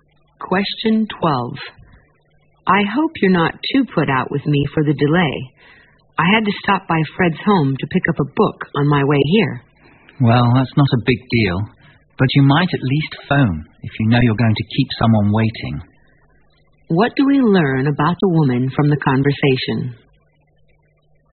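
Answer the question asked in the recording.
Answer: She is a little annoyed that the man didn't phone to say he'd be late.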